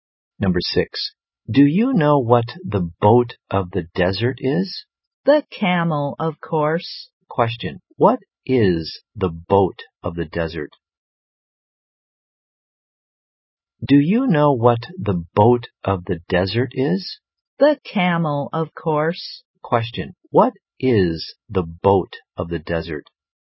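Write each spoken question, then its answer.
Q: Question, what is the boat of the desert?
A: The camel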